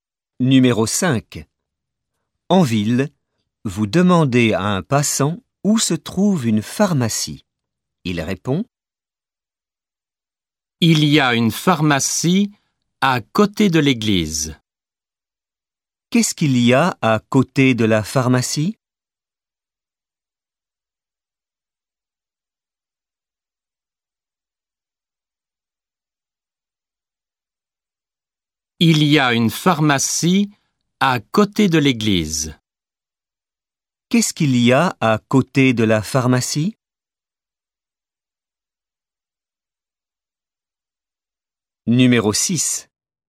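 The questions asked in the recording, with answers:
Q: Qu'est-ce qu'il y a à côté de la pharmacie ?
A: L'église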